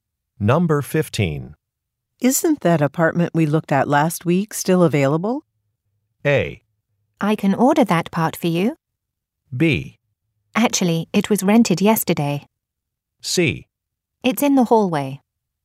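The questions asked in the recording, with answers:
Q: Isn't that apartment we looked at last week still available?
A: B: Actually, it was rented yesterday.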